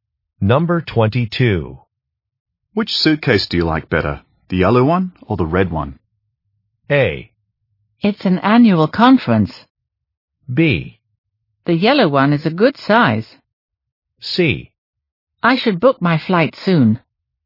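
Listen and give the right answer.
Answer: B: The yellow one is a good size.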